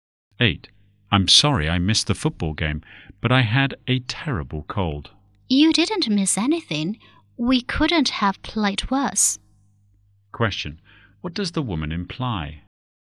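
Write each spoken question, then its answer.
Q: What does the woman imply?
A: The team played very badly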